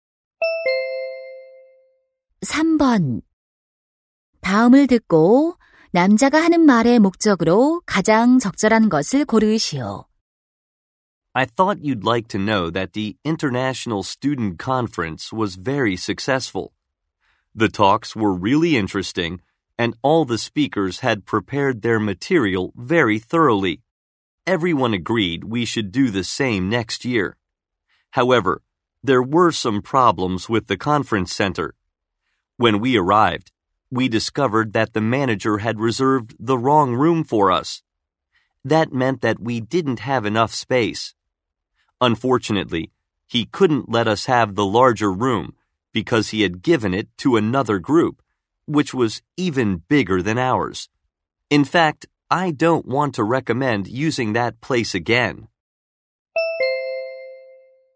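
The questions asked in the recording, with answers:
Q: 다음을 듣고 남자가 하는 말의 목적으로 가장 적절한 것을 고르시오.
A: 회의장(컨퍼런스 센터)에 대한 불만을 알리고 다시 이용하지 말 것을 권하려고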